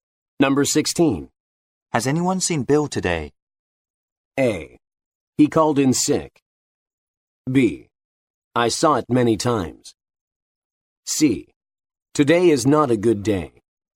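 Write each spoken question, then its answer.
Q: Has anyone seen Bill today?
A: A: He called in sick.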